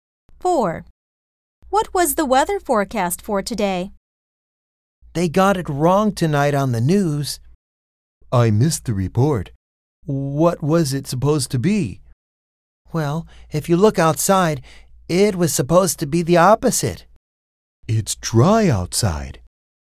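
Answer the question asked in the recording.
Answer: Rain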